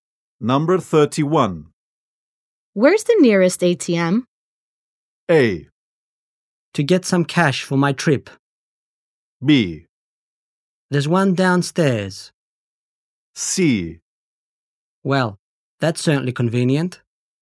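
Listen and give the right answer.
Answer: B: There's one downstairs.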